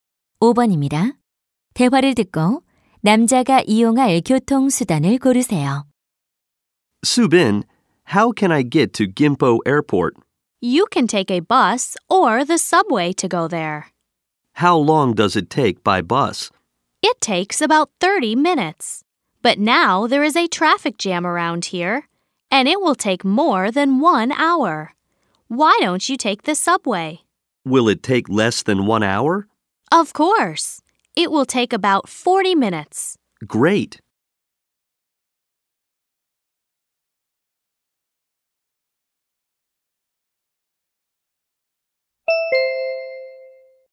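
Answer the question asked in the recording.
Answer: 지하철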